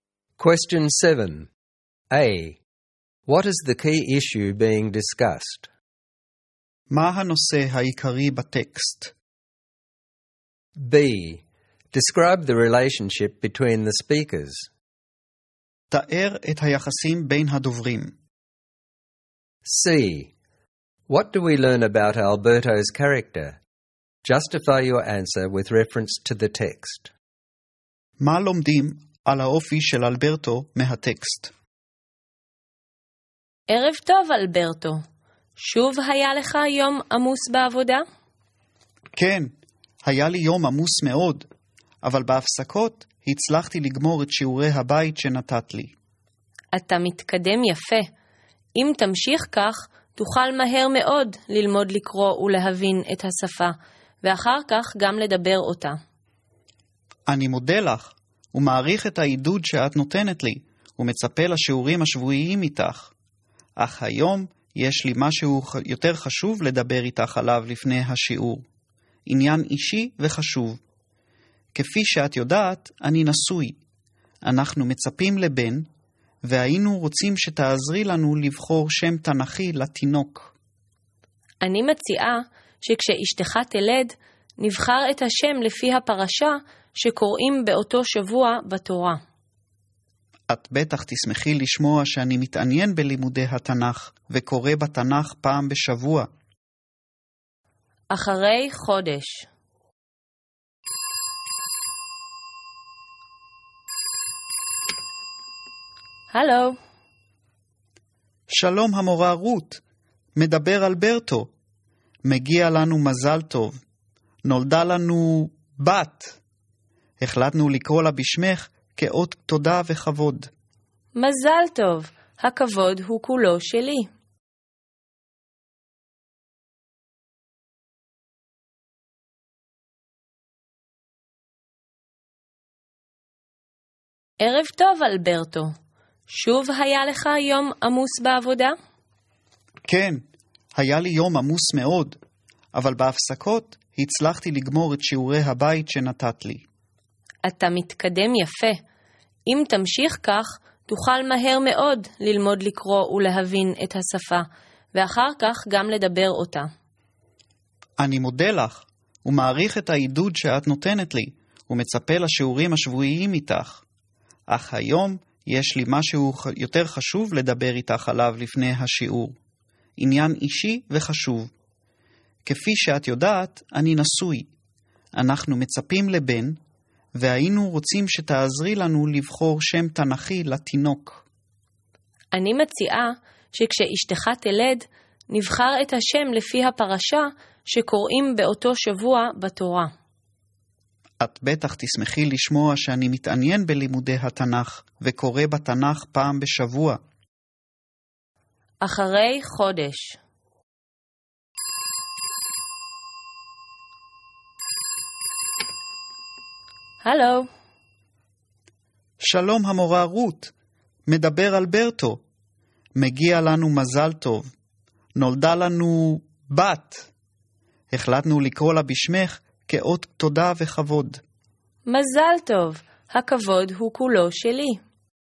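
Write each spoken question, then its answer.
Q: What is the key issue being discussed?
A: Choosing a biblical name for Alberto's expected baby

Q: Describe the relationship between the speakers.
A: Ruth is Alberto's teacher. Their relationship is warm and respectful: she encourages him, and he asks her advice on a personal matter and names his daughter after her.

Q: What do we learn about Alberto's character?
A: He is hardworking and diligent: he does his homework during his breaks on a busy day. He is grateful and respectful, since he names his daughter after Ruth. He is also interested in studying the Bible.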